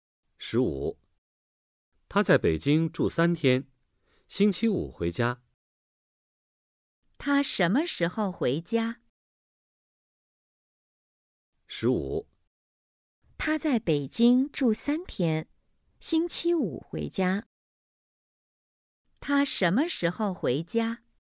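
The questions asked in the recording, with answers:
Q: 他什么时候回家?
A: 星期五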